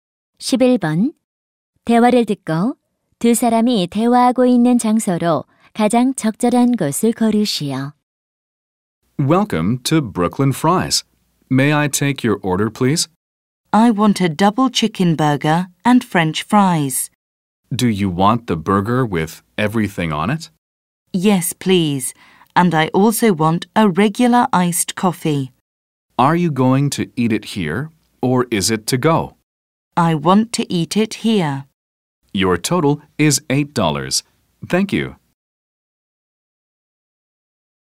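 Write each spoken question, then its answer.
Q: 대화를 듣고 두 사람이 대화하고 있는 장소로 가장 적절한 곳을 고르시오.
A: 패스트푸드점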